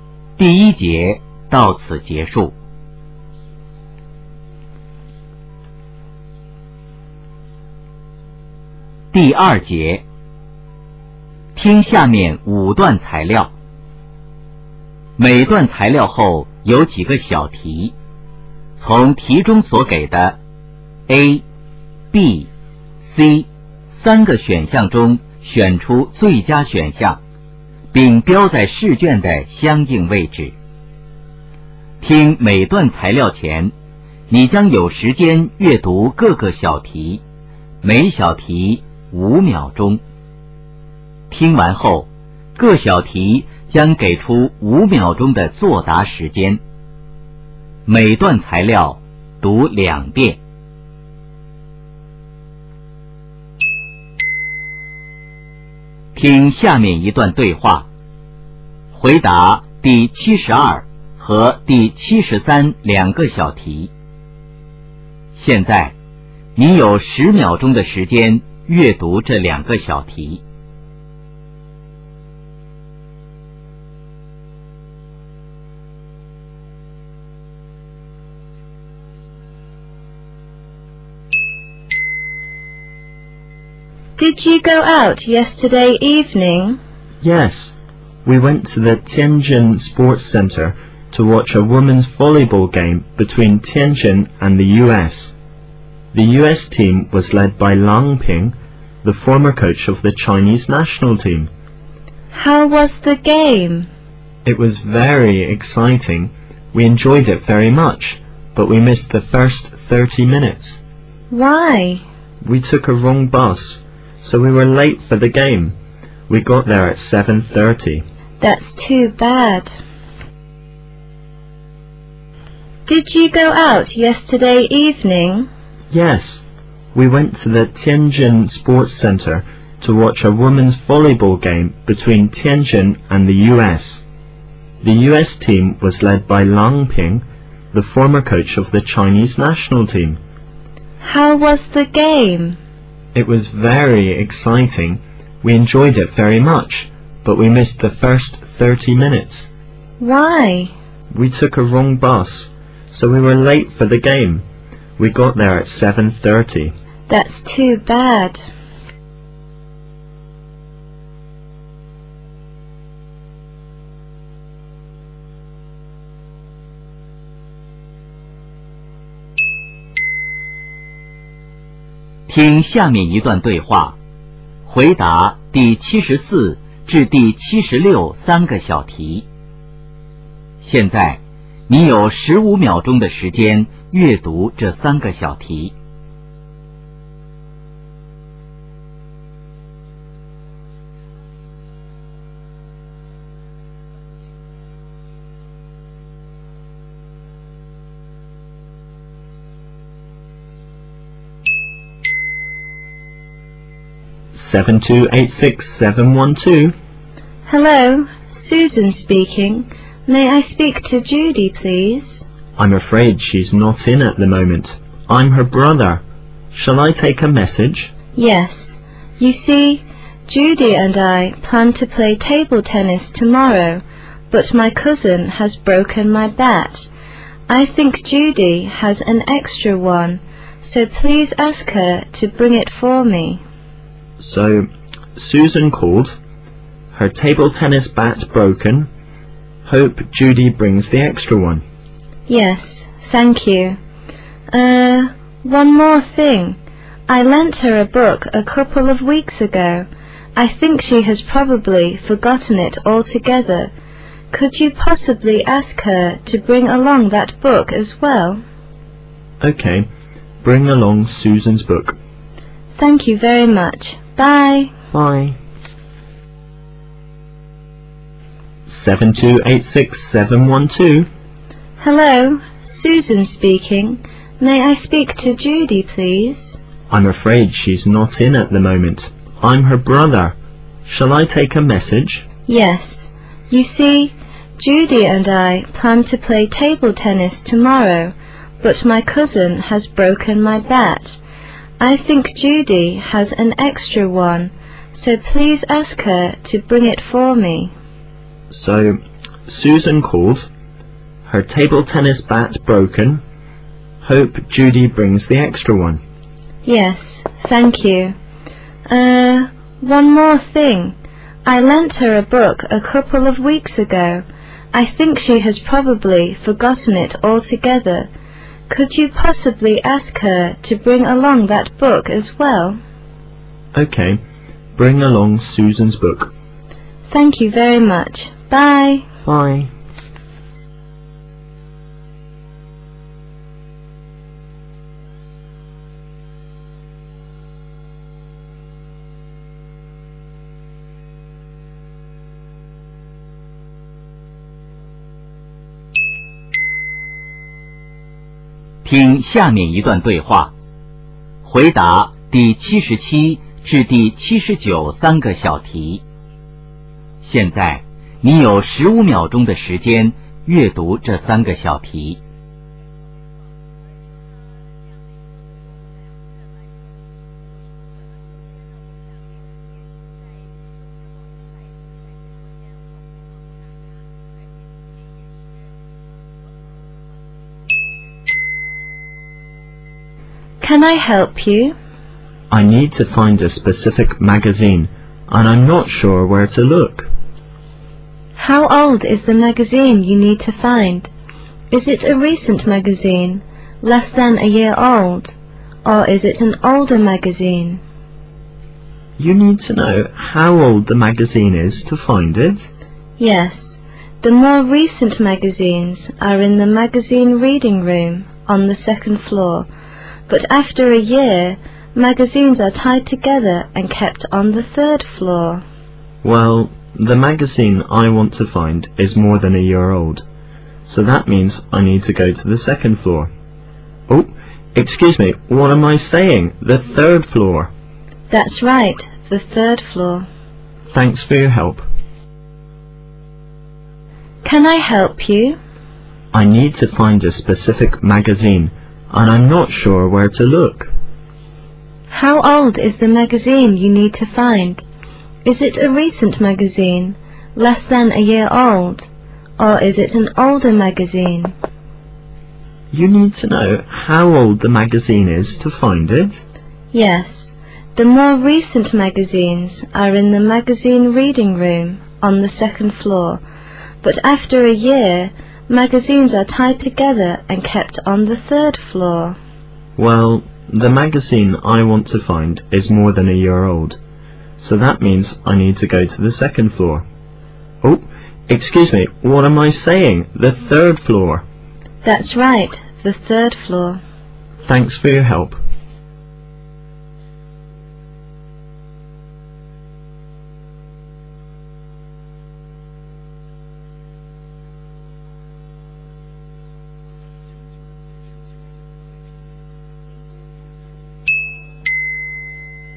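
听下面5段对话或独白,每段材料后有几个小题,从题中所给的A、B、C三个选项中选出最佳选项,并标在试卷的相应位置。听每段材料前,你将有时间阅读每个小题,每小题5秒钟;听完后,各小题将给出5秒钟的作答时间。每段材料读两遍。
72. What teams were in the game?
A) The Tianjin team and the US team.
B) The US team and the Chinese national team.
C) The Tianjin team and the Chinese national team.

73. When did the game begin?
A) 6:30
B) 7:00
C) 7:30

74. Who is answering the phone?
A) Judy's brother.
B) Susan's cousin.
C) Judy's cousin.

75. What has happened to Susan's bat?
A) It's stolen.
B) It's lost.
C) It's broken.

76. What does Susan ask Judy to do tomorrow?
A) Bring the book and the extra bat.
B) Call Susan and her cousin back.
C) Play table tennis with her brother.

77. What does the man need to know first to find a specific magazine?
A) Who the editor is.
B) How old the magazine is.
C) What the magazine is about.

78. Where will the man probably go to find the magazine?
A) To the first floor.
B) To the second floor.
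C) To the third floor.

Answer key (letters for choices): 72A, 73B, 74A, 75C, 76A, 77B, 78C

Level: 高考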